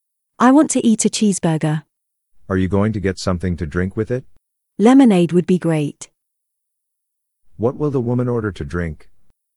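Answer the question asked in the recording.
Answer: Lemonade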